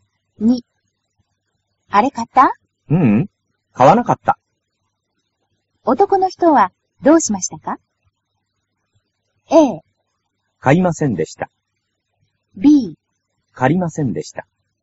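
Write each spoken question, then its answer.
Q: 男の人はどうしましたか?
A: A: 買いませんでした。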